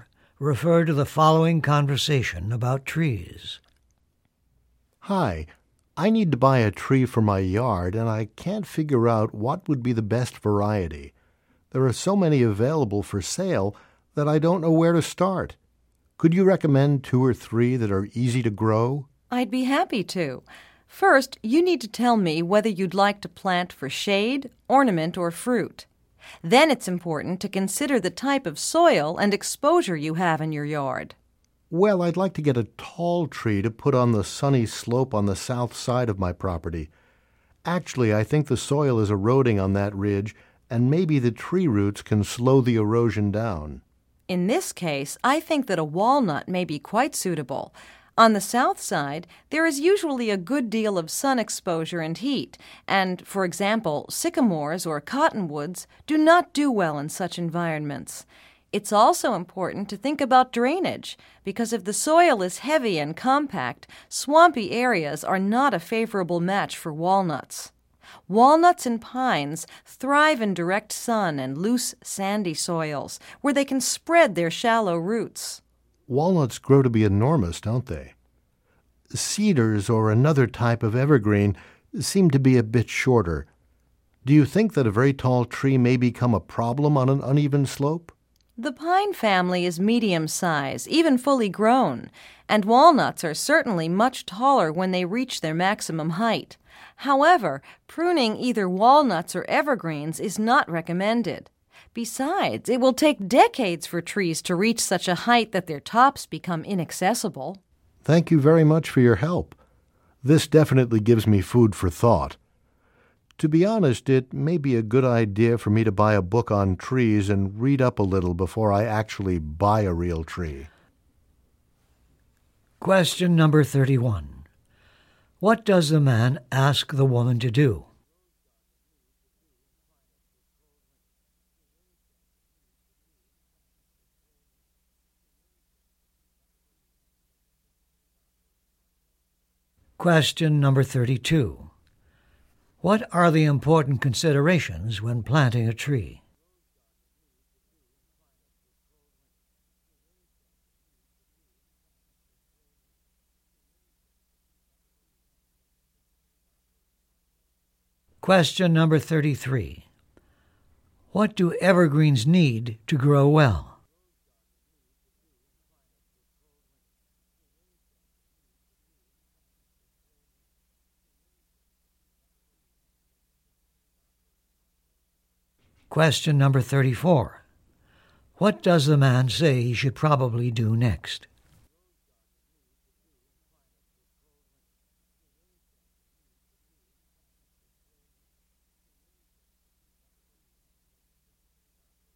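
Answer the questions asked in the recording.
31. Recommend two or three trees that are easy to grow
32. The purpose (shade, ornament or fruit), the soil type and the sun exposure
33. Direct sun and loose, sandy soil
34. Buy a book on trees and read up on them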